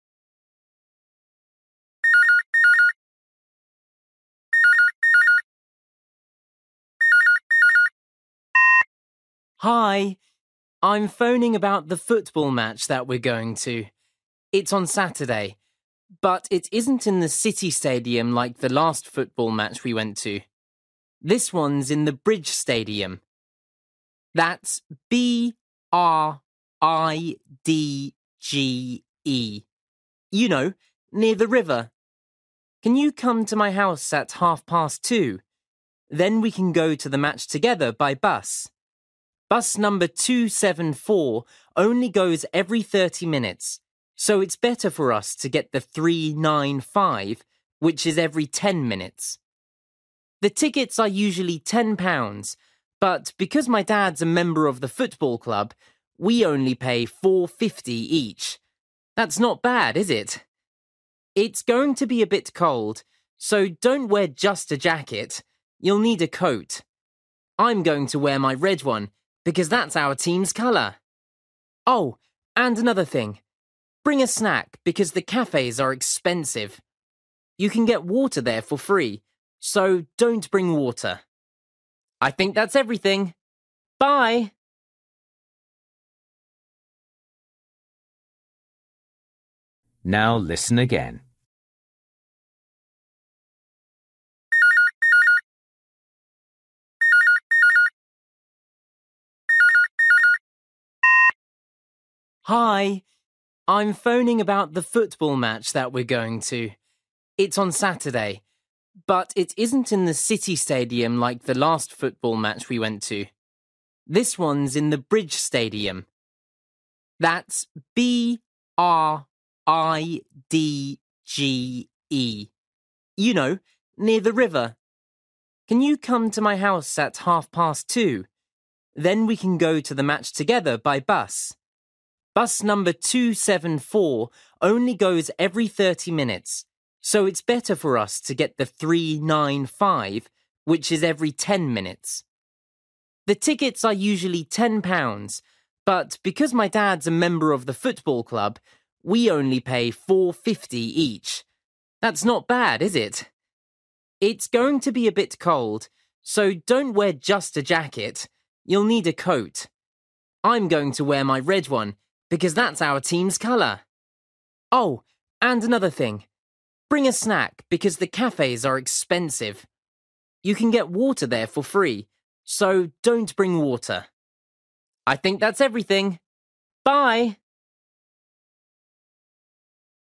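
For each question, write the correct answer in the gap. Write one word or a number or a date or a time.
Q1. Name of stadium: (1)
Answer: Bridge

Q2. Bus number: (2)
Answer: 395

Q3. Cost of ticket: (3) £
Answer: 4.50

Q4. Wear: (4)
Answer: coat

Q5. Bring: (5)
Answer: snack

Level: Luyện nghe trình độ A2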